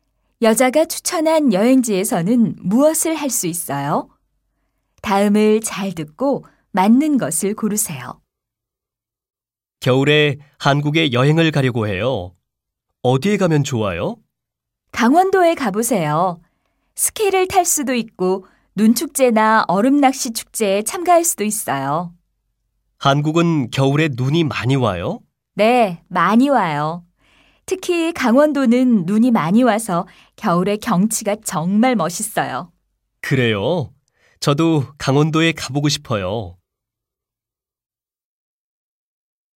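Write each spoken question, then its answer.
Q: 여자가 추천한 여행지에서는 무엇을 할 수 있어요?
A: 스키를 타거나 눈축제나 얼음낚시 축제에 참가할 수 있어요.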